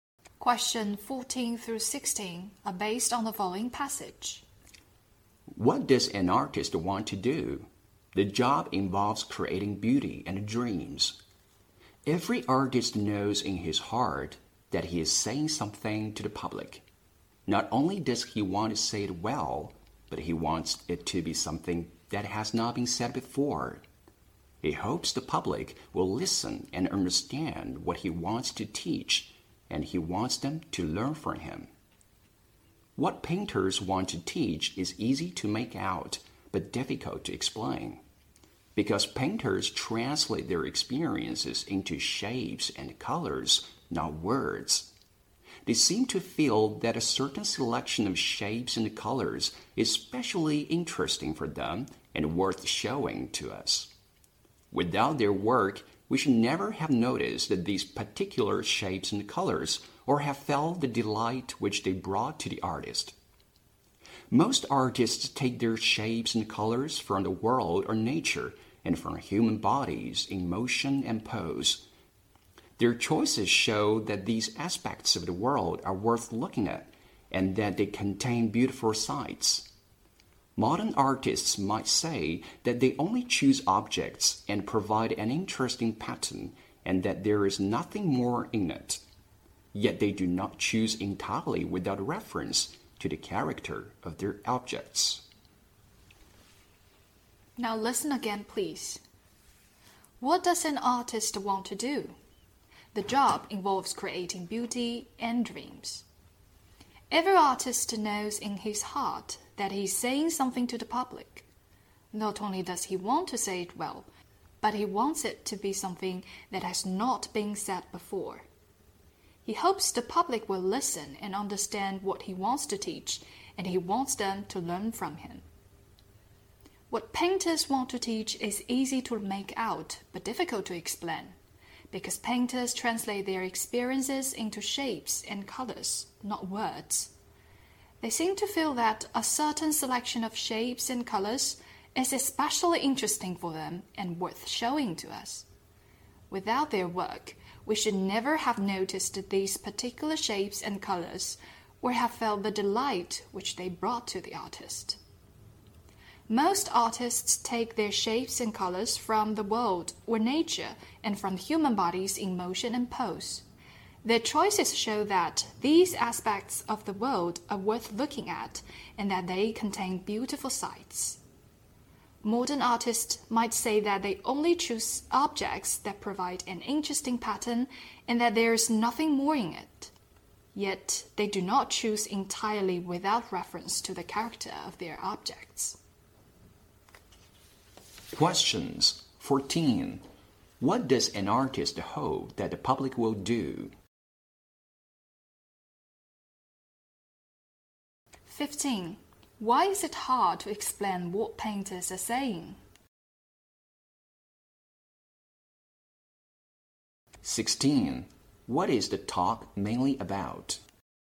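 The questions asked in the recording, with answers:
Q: What does an artist hope that the public will do?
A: Listen, understand and learn from him

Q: Why is it hard to explain what painters are saying?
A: Painters express their experiences in shapes and colors, not words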